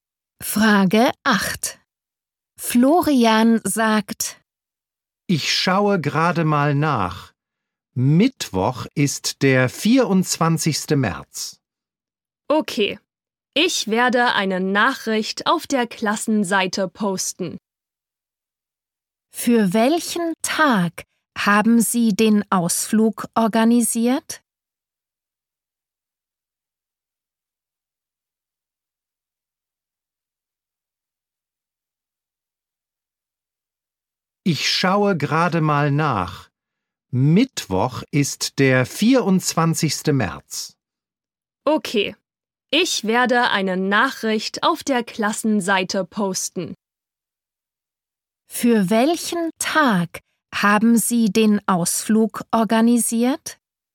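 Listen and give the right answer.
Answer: Mittwoch, den 24. März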